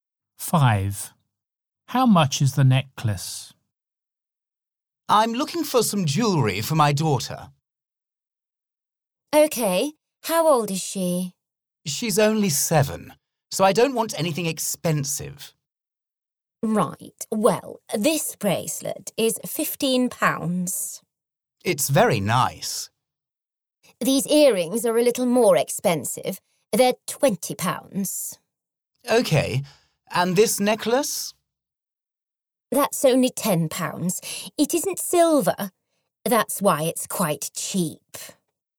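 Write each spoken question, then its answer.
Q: How much is the necklace?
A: £10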